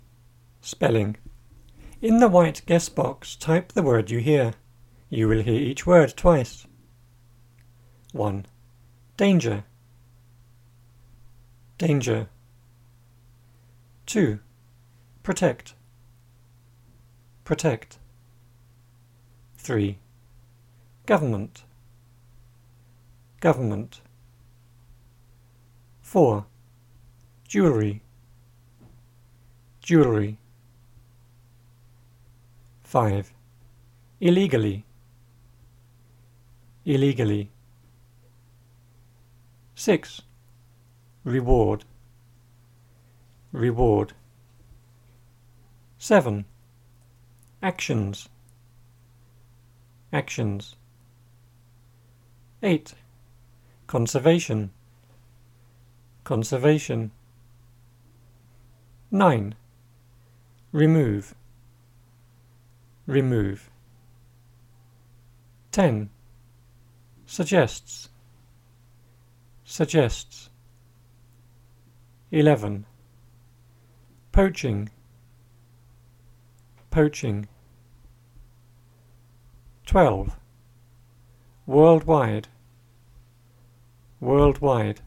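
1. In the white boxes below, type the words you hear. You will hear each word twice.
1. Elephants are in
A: danger

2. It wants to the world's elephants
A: protect

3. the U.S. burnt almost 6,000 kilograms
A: government

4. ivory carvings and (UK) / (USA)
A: jewellery / jewelry

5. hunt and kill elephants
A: illegally

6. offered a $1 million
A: reward

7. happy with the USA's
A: actions

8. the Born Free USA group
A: conservation

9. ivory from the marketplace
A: remove

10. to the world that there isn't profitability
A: suggests

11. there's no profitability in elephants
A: poaching

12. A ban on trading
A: worldwide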